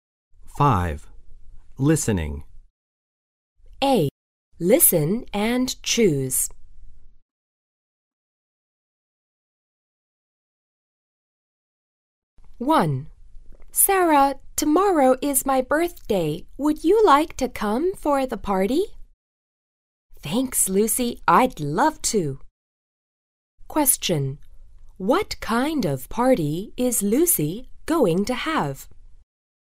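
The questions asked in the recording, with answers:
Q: What kind of party is Lucy going to have?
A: A birthday party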